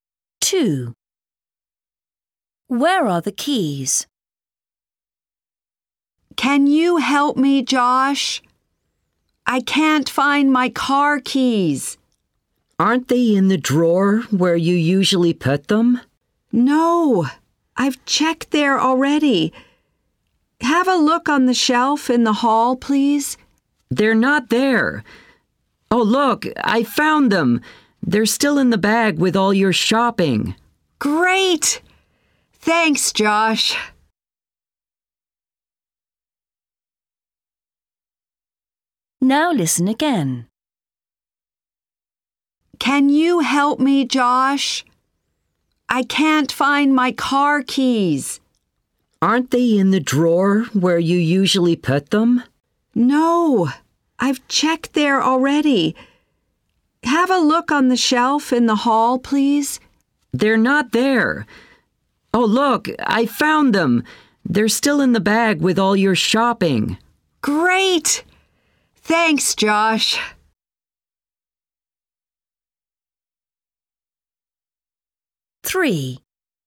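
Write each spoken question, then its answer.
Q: Where are the keys?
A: in the shopping bag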